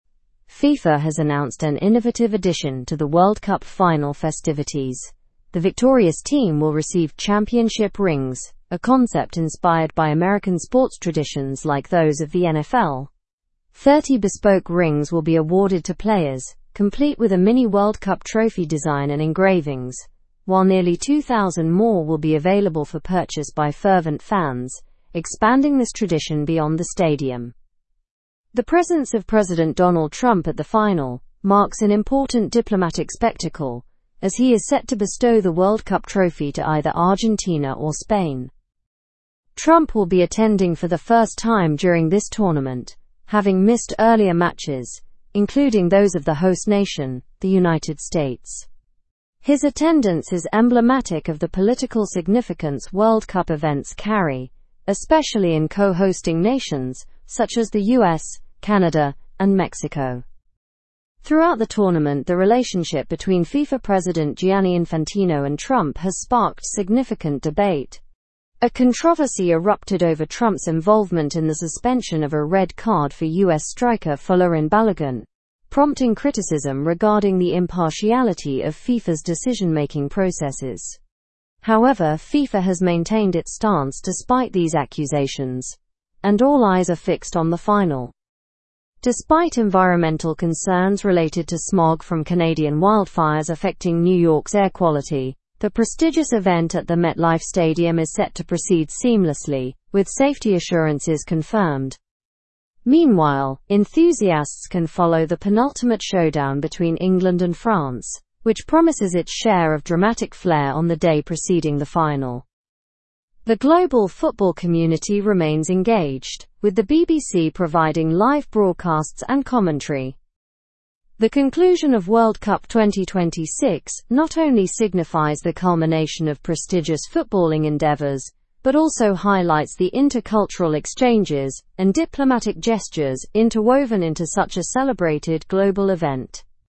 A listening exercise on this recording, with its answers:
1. What innovative addition did FIFA announce for the World Cup final?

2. Who will President Trump present the World Cup trophy to?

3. What controversy involved Trump and FIFA during the tournament?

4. How many rings will be made available for fans to purchase?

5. What caused environmental concerns during the World Cup?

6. Where is the final match held?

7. What team is mentioned in the penultimate showdown before the final?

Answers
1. Championship rings inspired by American sports traditions.
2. Either Argentina or Spain.
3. Trump's involvement in the suspension of a red card for U.S. striker Folarin Balogun.
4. Nearly two thousand rings.
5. Smog from Canadian wildfires affecting New York's air quality.
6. MetLife Stadium.
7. England and France.

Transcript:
FIFA has announced an innovative addition to the World Cup final festivities: the victorious team will receive championship rings, a concept inspired by American sports traditions like those of the NFL. Thirty bespoke rings will be awarded to players, complete with a mini World Cup trophy design and engravings, while nearly two thousand more will be available for purchase by fervent fans, expanding this tradition beyond the stadium.
The presence of President Donald Trump at the final marks an important diplomatic spectacle, as he is set to bestow the World Cup trophy to either Argentina or Spain. Trump will be attending for the first time during this tournament, having missed earlier matches, including those of the host nation, the United States. His attendance is emblematic of the political significance World Cup events carry, especially in co-hosting nations such as the U.S., Canada, and Mexico.
Throughout the tournament, the relationship between FIFA President Gianni Infantino and Trump has sparked significant debate. A controversy erupted over Trump's involvement in the suspension of a red card for U.S. striker Folarin Balogun, prompting criticism regarding the impartiality of FIFA's decision-making processes. However, FIFA has maintained its stance despite these accusations, and all eyes are fixed on the final.
Despite environmental concerns related to smog from Canadian wildfires affecting New York's air quality, the prestigious event at the MetLife Stadium is set to proceed seamlessly, with safety assurances confirmed. Meanwhile, enthusiasts can follow the penultimate showdown between England and France, which promises its share of dramatic flair on the day preceding the final.
its share of dramatic flair on the day preceding the final. The global football community remains engaged, with the BBC providing live broadcasts and ?. The conclusion of World Cup 2026 not only signifies the culmination of prestigious footballing endeavours but also highlights the intercultural exchanges and diplomatic gestures interwoven into such a celebrated global event.

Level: (Level 4)